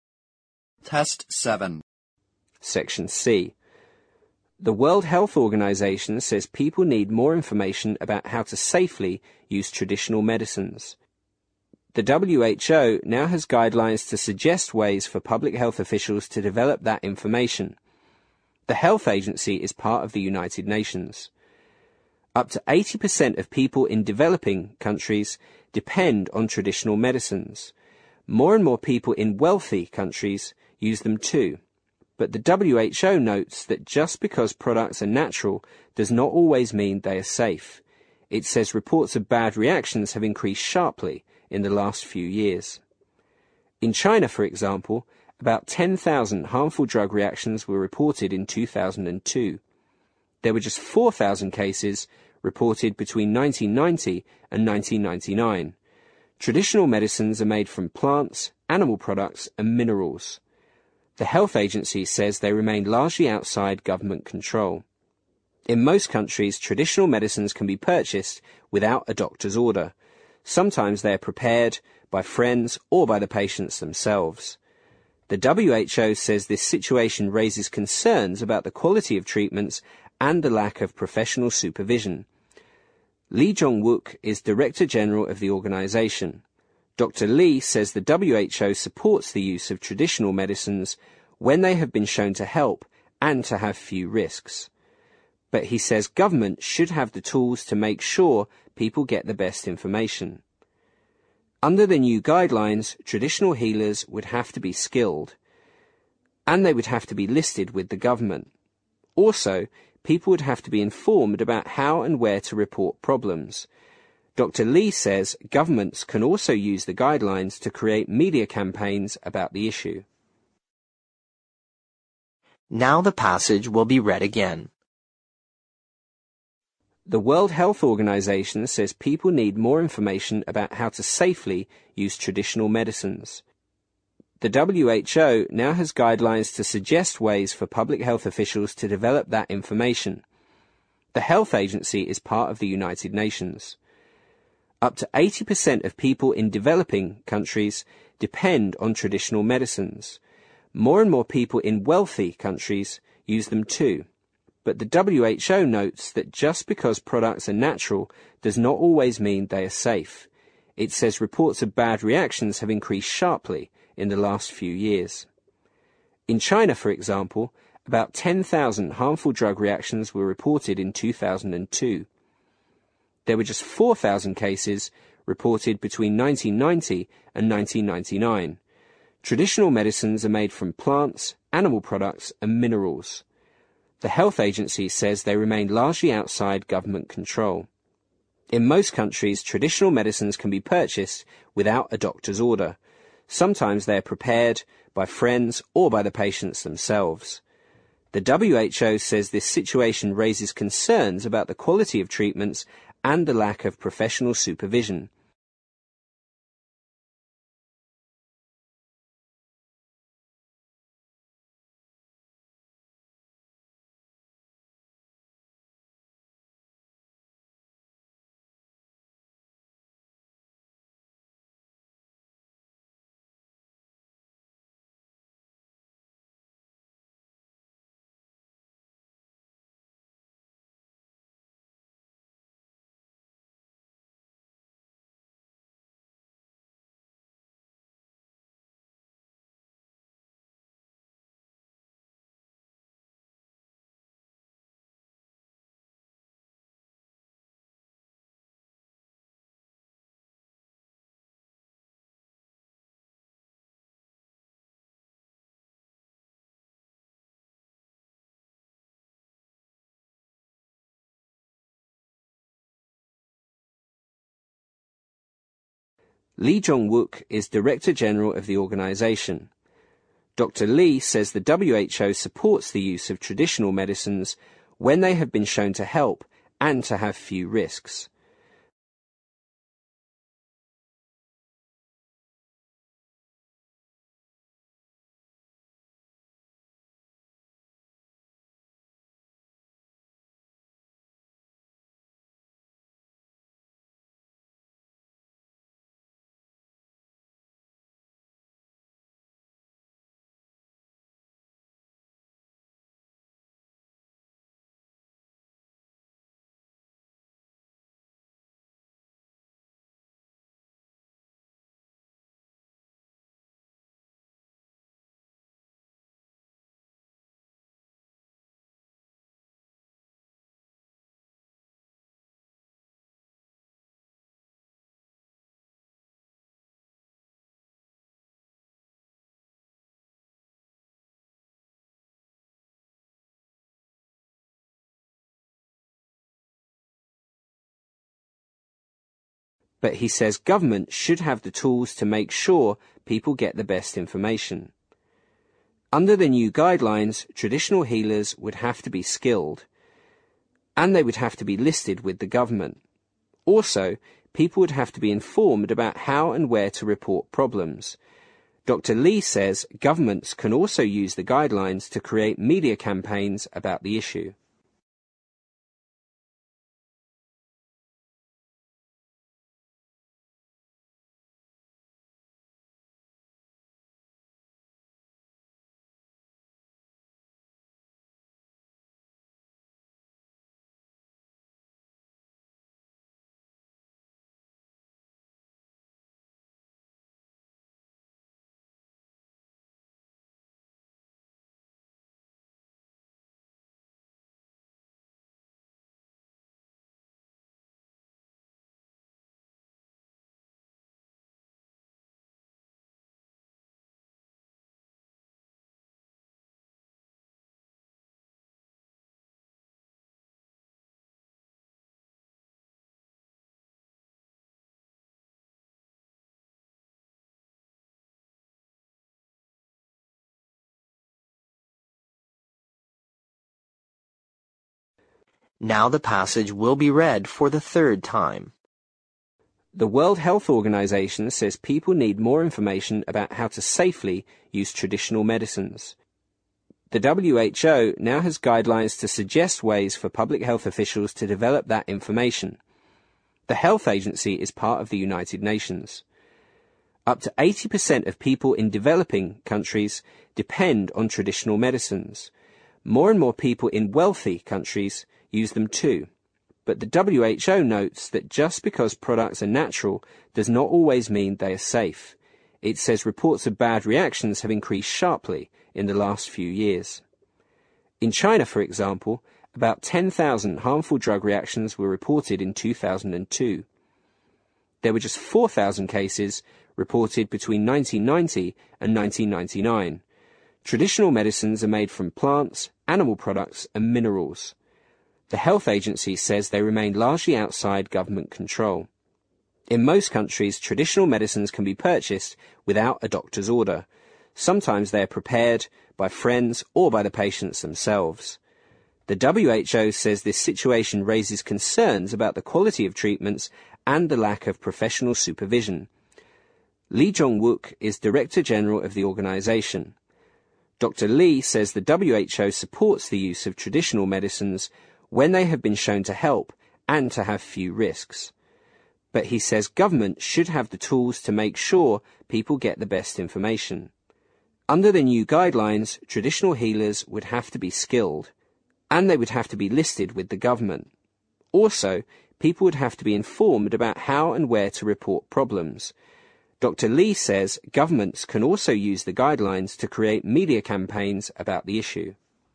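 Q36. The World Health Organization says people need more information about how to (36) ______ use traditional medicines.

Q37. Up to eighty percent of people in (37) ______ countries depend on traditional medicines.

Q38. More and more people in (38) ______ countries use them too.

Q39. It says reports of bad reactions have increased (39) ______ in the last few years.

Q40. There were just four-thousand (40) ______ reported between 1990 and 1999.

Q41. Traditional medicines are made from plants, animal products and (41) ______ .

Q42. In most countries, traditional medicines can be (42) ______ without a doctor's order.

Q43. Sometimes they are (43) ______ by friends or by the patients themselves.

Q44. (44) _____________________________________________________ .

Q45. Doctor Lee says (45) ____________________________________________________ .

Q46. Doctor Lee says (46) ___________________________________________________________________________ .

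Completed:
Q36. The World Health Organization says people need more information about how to safely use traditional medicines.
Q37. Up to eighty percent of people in developing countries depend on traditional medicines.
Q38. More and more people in wealthy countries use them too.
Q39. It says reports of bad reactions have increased sharply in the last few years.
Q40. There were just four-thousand cases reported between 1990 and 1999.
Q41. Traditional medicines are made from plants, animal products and minerals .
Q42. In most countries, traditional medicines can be purchased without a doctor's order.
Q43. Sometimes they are prepared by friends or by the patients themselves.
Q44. The WHO says this situation raises concerns about the quality of treatments and the lack of professional supervision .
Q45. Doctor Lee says the WHO supports the use of traditional medicines when they have been shown to help and to have few risks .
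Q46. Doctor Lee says governments can also use the guidelines to create media campaigns about the issue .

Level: 新编四级听力练习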